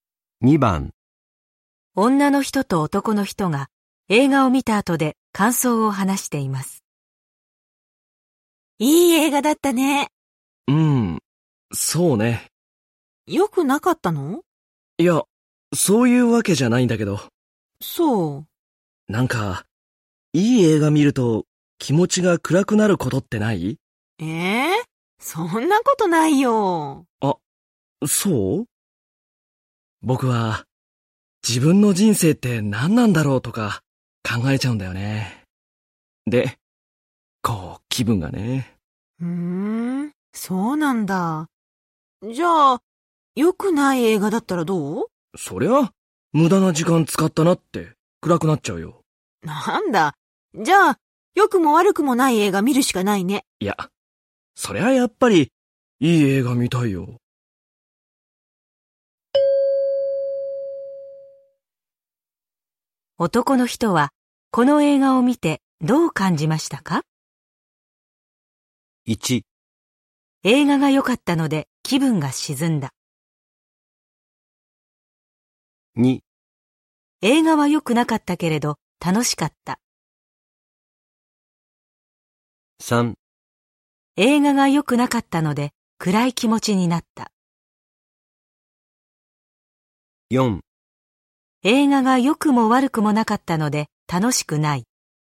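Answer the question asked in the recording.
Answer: 1: 映画が良かったので気分が沈んだ。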